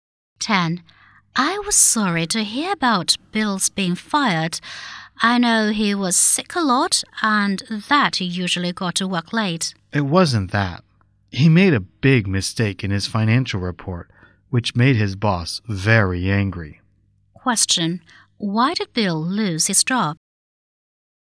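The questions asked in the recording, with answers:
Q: Why did Bill lose his job?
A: He made a big mistake in his financial report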